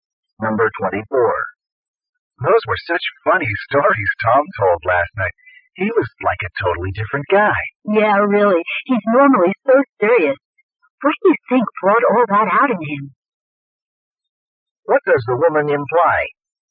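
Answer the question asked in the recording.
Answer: Tom is usually serious, so his funny behavior was surprising.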